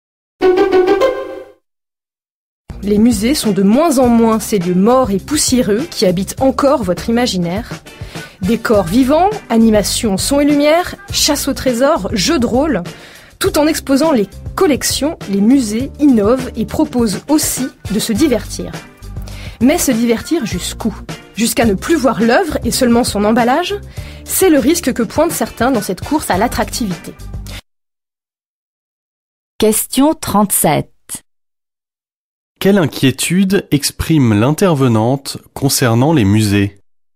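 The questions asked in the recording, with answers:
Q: Quelle inquiétude exprime l'intervenante concernant les musées?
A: Que le divertissement fasse oublier les œuvres.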